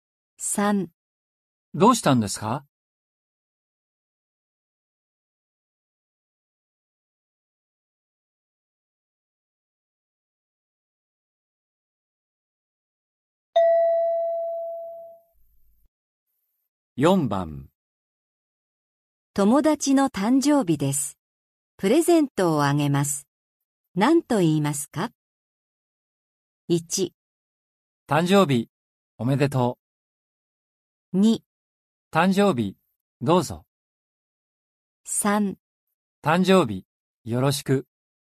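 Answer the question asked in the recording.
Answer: 1: 誕生日、おめでとう。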